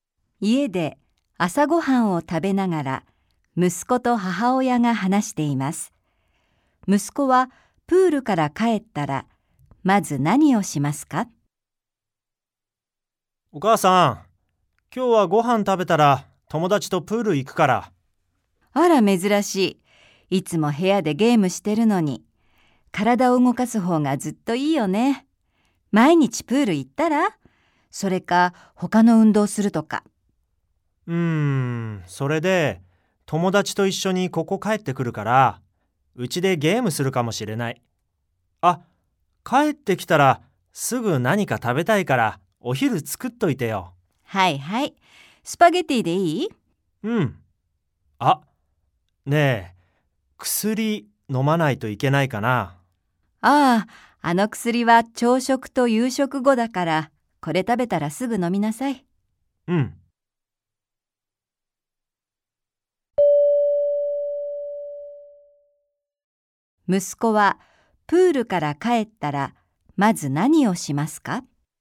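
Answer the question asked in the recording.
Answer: 昼ご飯(スパゲティ)を食べる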